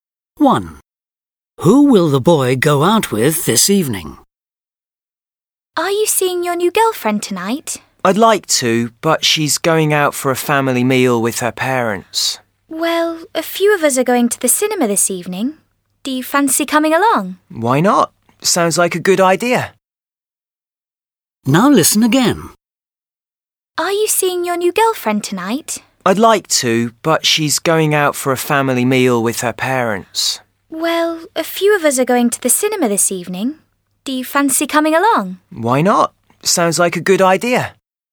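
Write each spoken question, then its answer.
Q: Who will the boy go out with this evening?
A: A few friends (to the cinema)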